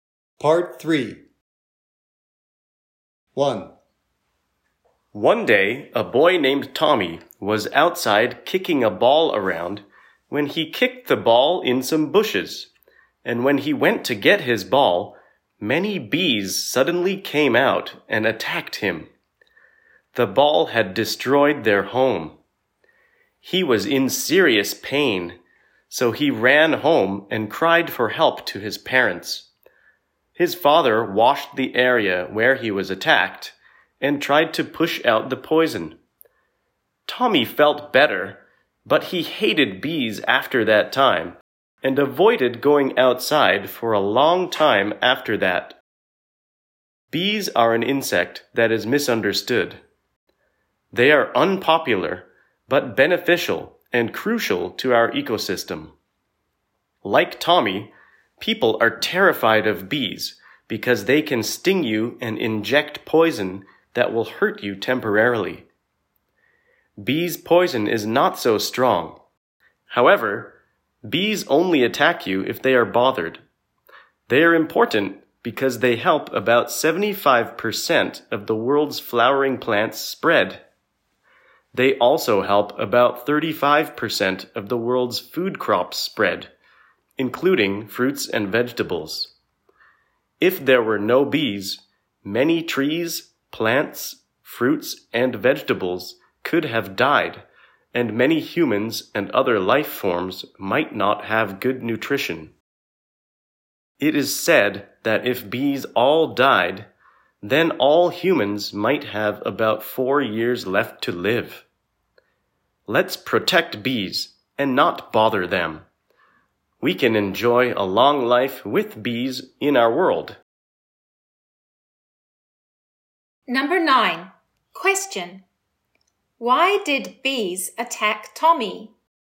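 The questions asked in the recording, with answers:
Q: Why did bees attack Tommy?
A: His ball destroyed their home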